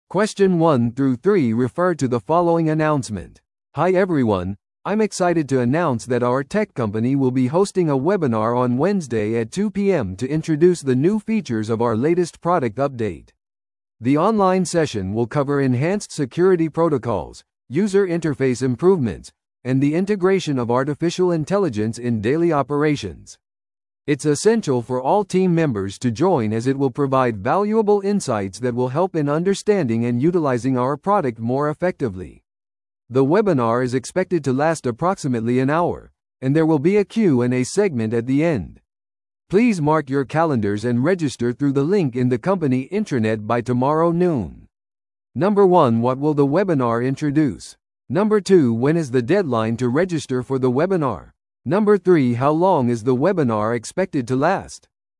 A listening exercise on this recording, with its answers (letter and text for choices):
Listen to the audio below and answer the questions.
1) What will the webinar introduce?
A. 会社の経営戦略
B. 製品アップデートの新機能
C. 従業員の業績評価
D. 顧客サービス技術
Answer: B. 製品アップデートの新機能

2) When is the deadline to register for the webinar?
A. 今日の6pmまでに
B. 明日の正午までに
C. 水曜日の2pmまでに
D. 水曜日の6pmまでに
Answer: B. 明日の正午までに

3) How long is the webinar expected to last?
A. 30分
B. 1時間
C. 2時間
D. 不定期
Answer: B. 1時間

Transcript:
Hi everyone, I'm excited to announce that our tech company will be hosting a webinar on Wednesday at 2pm to introduce the new features of our latest product update. The online session will cover enhanced security protocols, user interface improvements, and the integration of artificial intelligence in daily operations. It's essential for all team members to join as it will provide valuable insights that will help in understanding and utilizing our product more effectively. The webinar is expected to last approximately an hour, and there will be a Q&A segment at the end. Please mark your calendars and register through the link in the company intranet by tomorrow noon.